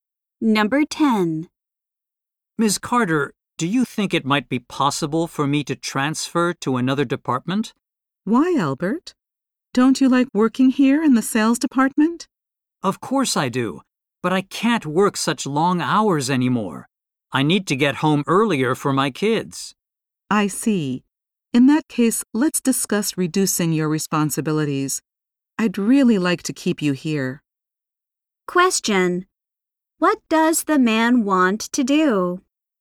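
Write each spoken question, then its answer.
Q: What does the man want to do?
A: Transfer to another department so he can work shorter hours.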